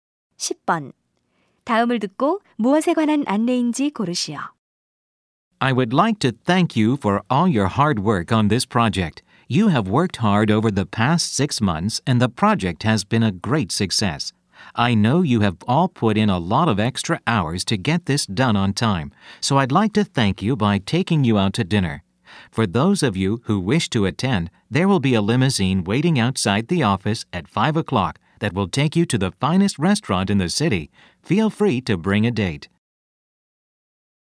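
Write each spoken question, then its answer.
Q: 다음을 듣고 무엇에 관한 안내인지 고르시오.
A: 프로젝트 성공 감사 저녁 식사 초대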